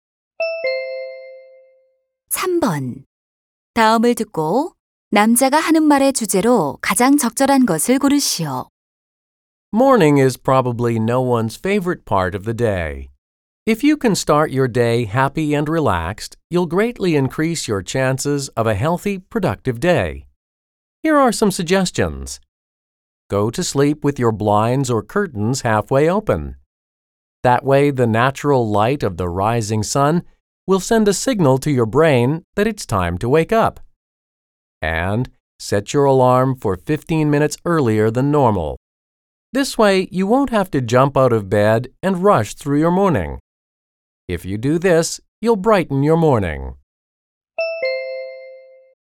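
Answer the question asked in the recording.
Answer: 아침을 상쾌하게 시작하는 방법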